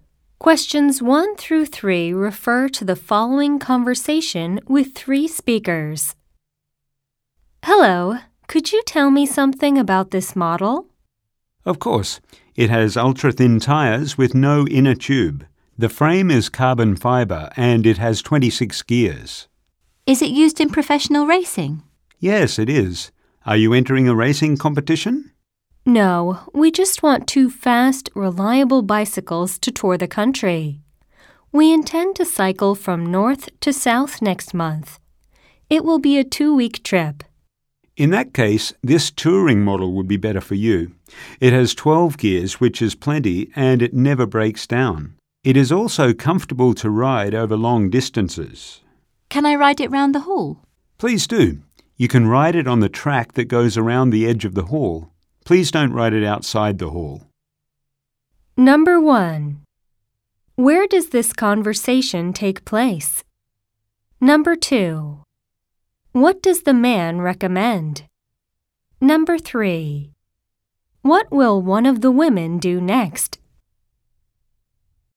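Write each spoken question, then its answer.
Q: What does the man recommend?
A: The touring bicycle model

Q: What will one of the women do next?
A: Test-ride the bicycle around the hall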